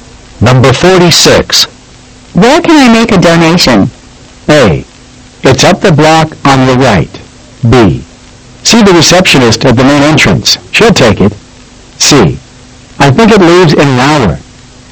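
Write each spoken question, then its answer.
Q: Where can I make a donation?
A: B: See the receptionist at the main entrance. She'll take it.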